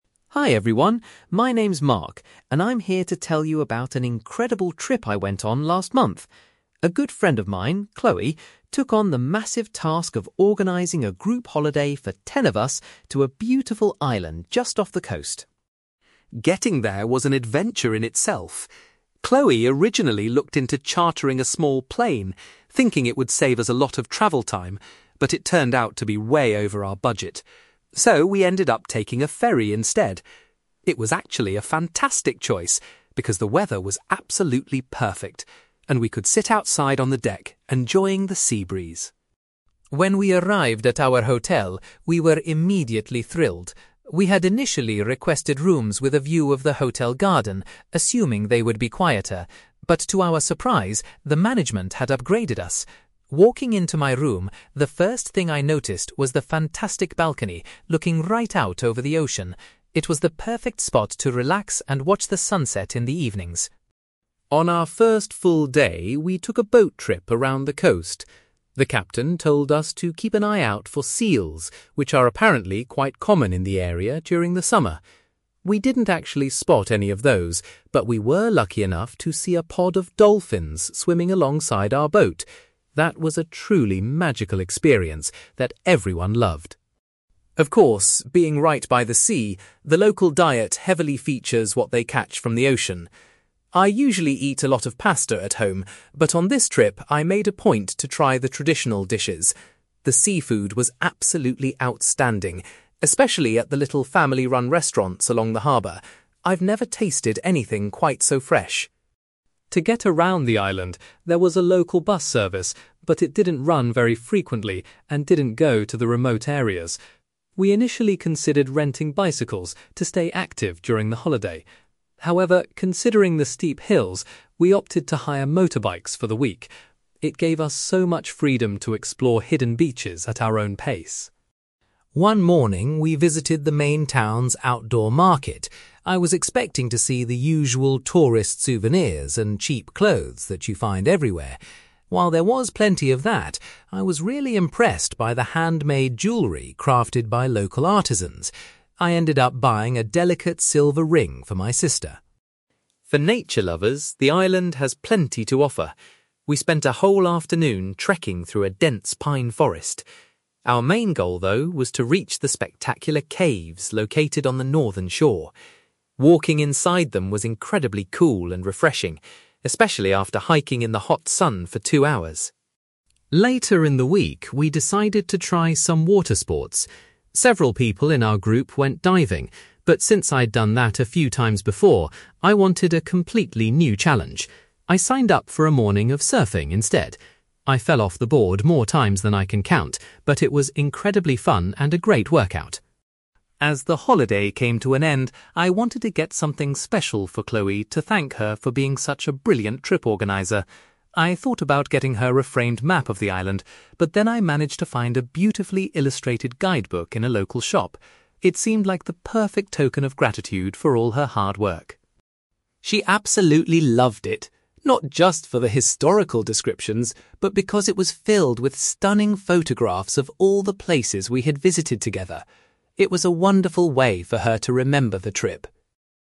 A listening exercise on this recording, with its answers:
You will hear a man called Mark talking about a group holiday to an island. For questions 9-18, complete the sentences with a word or short phrase.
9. Mark and his friends travelled to the island by (9)........................... because it was cheaper.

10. Mark was delighted that his hotel room had a (10)........................... with an ocean view.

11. During a boat trip, Mark enjoyed watching some (11)........................... in the water.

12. Mark highly recommends the local (12)........................... served near the harbor.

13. The group decided that renting (13)........................... was the best way to travel around the hilly island.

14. At the outdoor market, Mark bought some beautiful (14)........................... as a present for his sister.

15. Mark's group walked through a forest to explore some (15)........................... by the sea.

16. Mark chose to do some (16)........................... rather than the activity his friends did.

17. Mark bought a (17)........................... to give Chloe to show his appreciation for organizing the holiday.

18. Chloe was particularly pleased with the (18)........................... contained in Mark's gift.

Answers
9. ferry
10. balcony
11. dolphins
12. seafood
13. motorbikes
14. jewellery / jewelry
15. caves
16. surfing
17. guidebook
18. photographs / photos

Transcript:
Mark: Hi everyone! My name is Mark, and I'm here to tell you about an incredible trip I went on last month. A good friend of mine, Chloe, took on the massive task of organizing a group holiday for ten of us to a beautiful island just off the coast.
Getting there was an adventure in itself. Chloe originally looked into chartering a small plane, thinking it would save us a lot of travel time, but it turned out to be way over our budget. So, we ended up taking a ferry instead. It was actually a fantastic choice because the weather was absolutely perfect and we could sit outside on the deck enjoying the sea breeze.
When we arrived at our hotel, we were immediately thrilled. We had initially requested rooms with a view of the hotel garden, assuming they would be quieter. But to our surprise, the management had upgraded us. Walking into my room, the first thing I noticed was the fantastic balcony looking right out over the ocean. It was the perfect spot to relax and watch the sunset in the evenings.
On our first full day, we took a boat trip around the coast. The captain told us to keep an eye out for seals, which are apparently quite common in the area during the summer. We didn't actually spot any of those, but we were lucky enough to see a pod of dolphins swimming alongside our boat. That was a truly magical experience that everyone loved.
Of course, being right by the sea, the local diet heavily features what they catch from the ocean. I usually eat a lot of pasta at home, but on this trip, I made a point to try the traditional dishes. The seafood was absolutely outstanding, especially at the little family-run restaurants along the harbor. I've never tasted anything quite so fresh.
To get around the island, there was a local bus service, but it didn't run very frequently and didn't go to the remote areas. We initially considered renting bicycles to stay active during the holiday. However, considering the steep hills, we opted to hire motorbikes for the week. It gave us so much freedom to explore hidden beaches at our own pace.
One morning, we visited the main town's outdoor market. I was expecting to see the usual tourist souvenirs and cheap clothes that you find everywhere. While there was plenty of that, I was really impressed by the handmade jewellery crafted by local artisans. I ended up buying a delicate silver ring for my sister.
For nature lovers, the island has plenty to offer. We spent a whole afternoon trekking through a dense pine forest. Our main goal, though, was to reach the spectacular caves located on the northern shore. Walking inside them was incredibly cool and refreshing, especially after hiking in the hot sun for two hours.
Later in the week, we decided to try some water sports. Several people in our group went diving, but since I'd done that a few times before, I wanted a completely new challenge. I signed up for a morning of surfing instead. I fell off the board more times than I can count, but it was incredibly fun and a great workout.
As the holiday came to an end, I wanted to get something special for Chloe to thank her for being such a brilliant trip organizer. I thought about getting her a framed map of the island, but then I managed to find a beautifully illustrated guidebook in a local shop. It seemed like the perfect token of gratitude for all her hard work.
She absolutely loved it, not just for the historical descriptions, but because it was filled with stunning photographs of all the places we had visited together. It was a wonderful way for her to remember the trip!

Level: B2